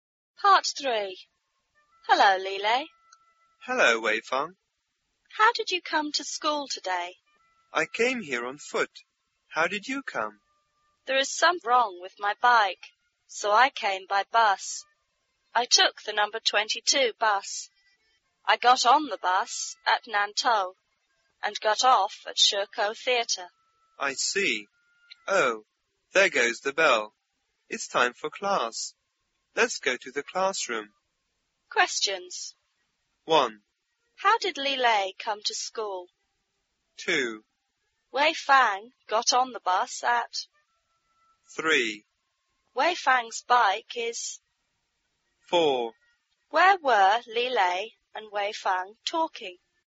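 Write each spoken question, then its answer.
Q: How did Lile come to school?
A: On foot

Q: Wei Fang got on the bus at...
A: Nantou

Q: Wei Fang's bike is...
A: broken (something wrong with it)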